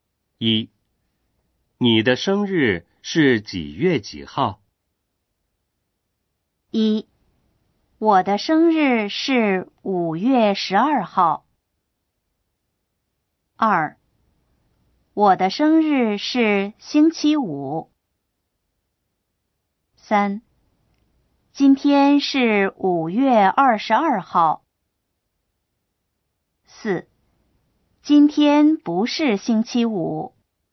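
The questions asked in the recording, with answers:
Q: 你的生日是几月几号?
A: 1: 我的生日是5月12号。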